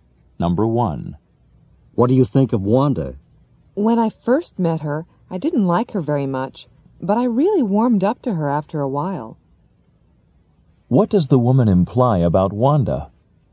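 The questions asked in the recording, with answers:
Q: What does the woman imply about Wanda?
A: She didn't like Wanda at first, but she likes her now.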